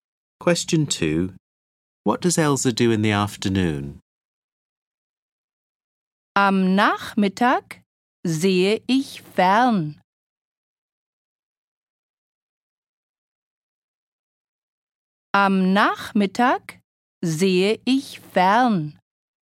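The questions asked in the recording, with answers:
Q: What does Elsa do in the afternoon?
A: She watches TV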